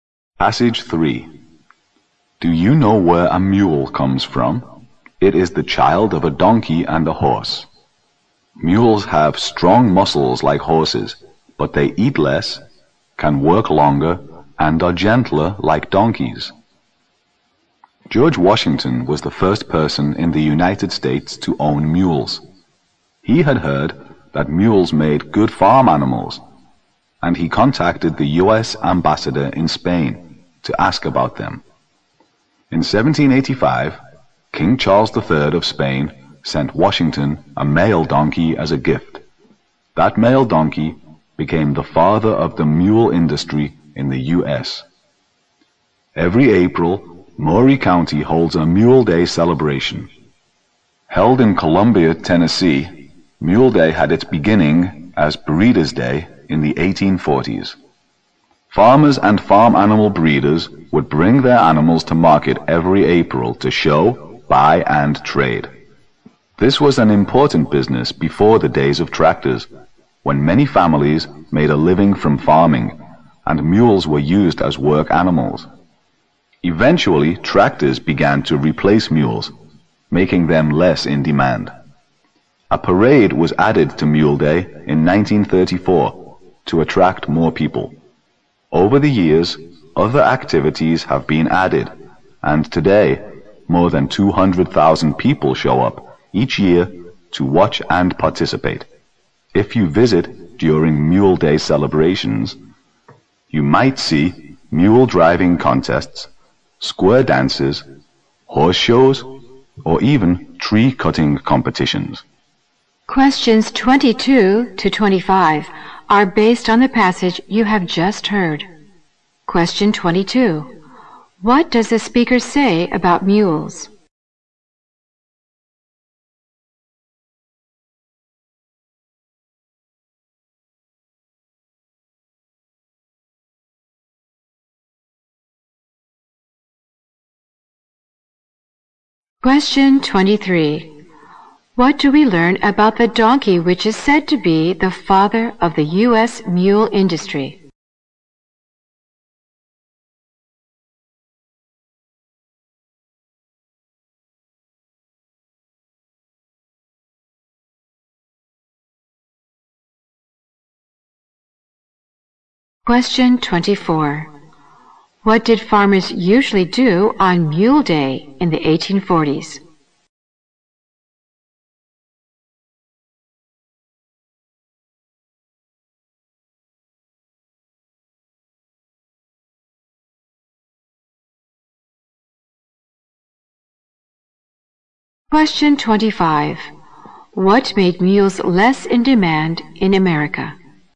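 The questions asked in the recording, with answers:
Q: What does the speaker say about mules?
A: They are strong like horses but eat less, work longer and are gentler

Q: What did farmers usually do on Mule Day in the 1840s?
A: Bring their animals to market to show, buy and trade

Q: What made mules less in demand in America?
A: Tractors replacing them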